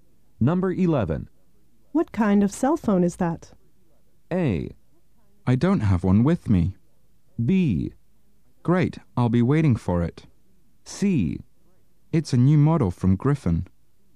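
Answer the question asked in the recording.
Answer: C: It's a new model from Griffin.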